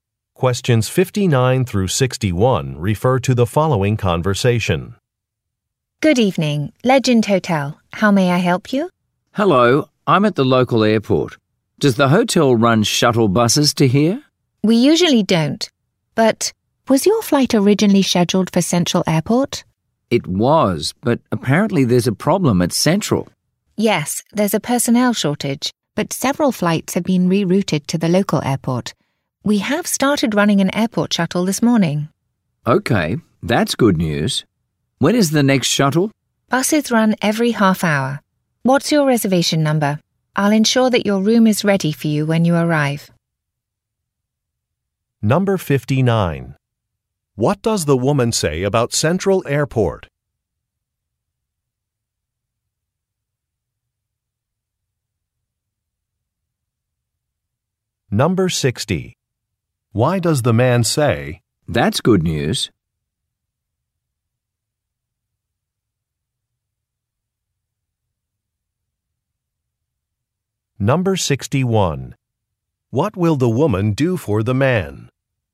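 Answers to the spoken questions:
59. It has a personnel shortage
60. The hotel is running a shuttle to the local airport
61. Make sure his room is ready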